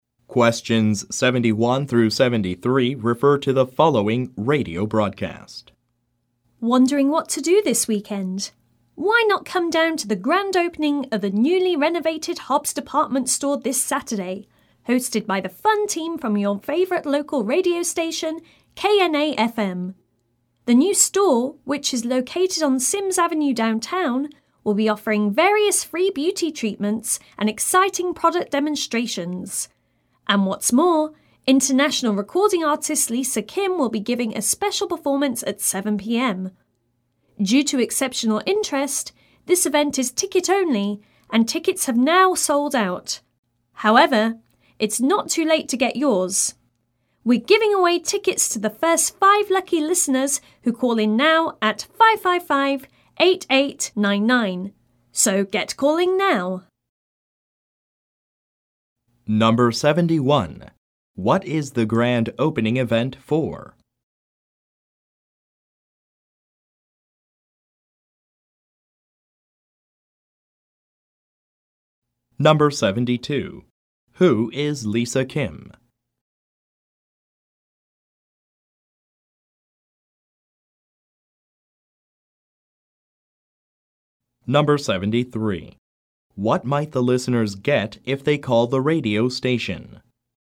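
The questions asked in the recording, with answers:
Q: What is the grand opening event for?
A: A newly renovated Hobbs department store

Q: Who is Lisa Kim?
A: An international recording artist

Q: What might the listeners get if they call the radio station?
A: Tickets to the event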